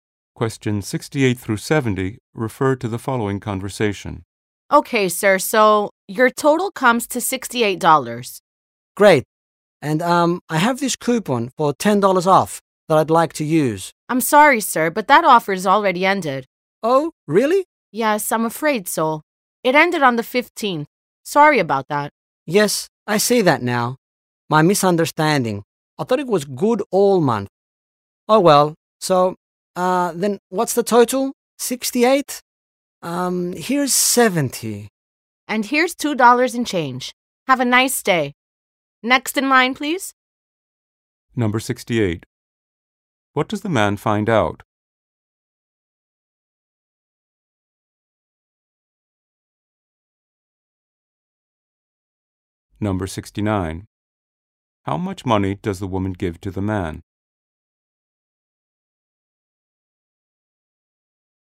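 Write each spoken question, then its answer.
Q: What does the man find out?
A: The coupon offer has ended.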